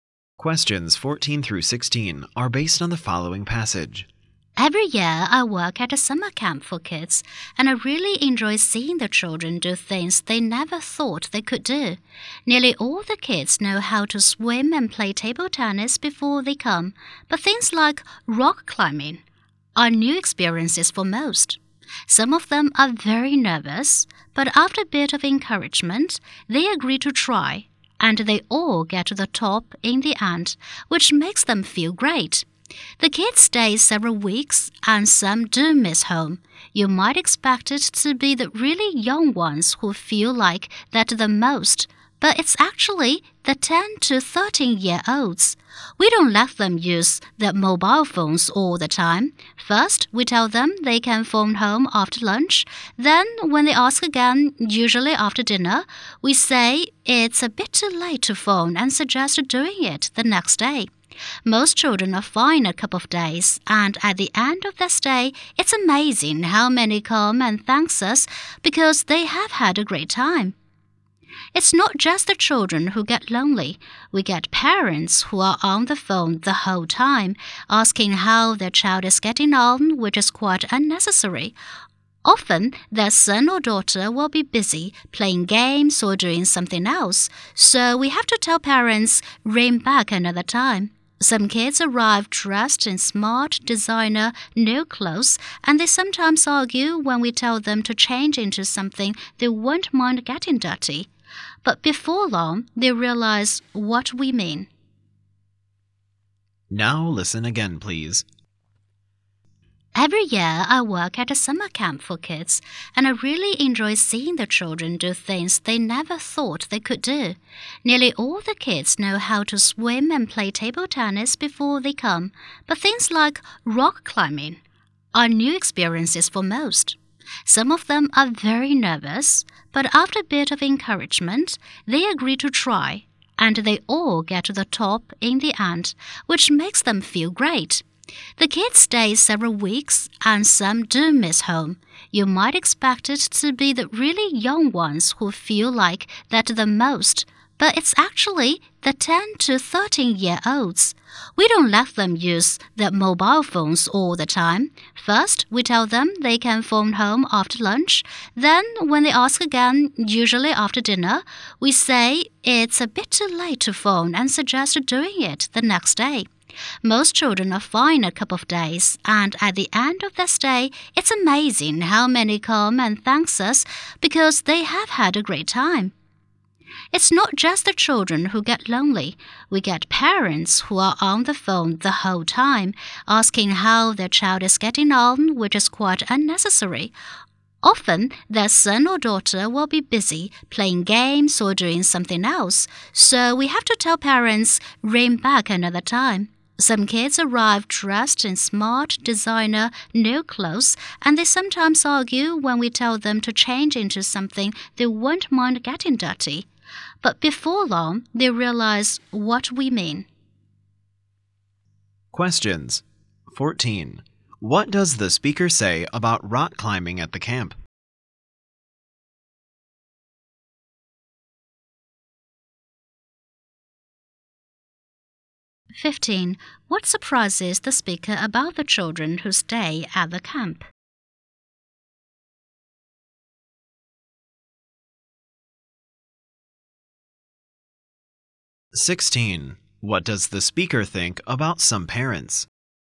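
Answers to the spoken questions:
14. It is new to most kids, but they all reach the top in the end
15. The 10 to 13 year olds miss home the most, not the youngest ones
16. They phone too often, which is unnecessary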